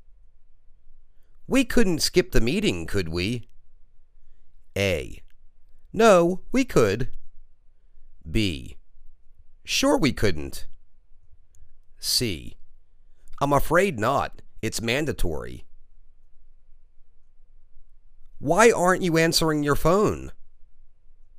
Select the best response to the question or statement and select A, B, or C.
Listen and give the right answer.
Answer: I'm afraid not; it's mandatory.